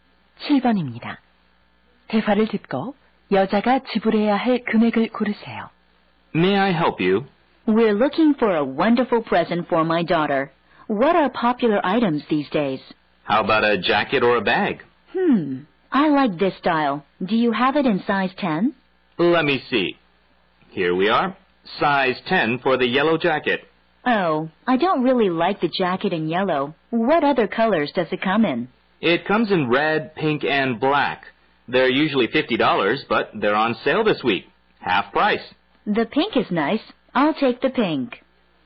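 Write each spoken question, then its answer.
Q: 대화를 듣고 여자가 지불해야 할 금액을 고르세요.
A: 25달러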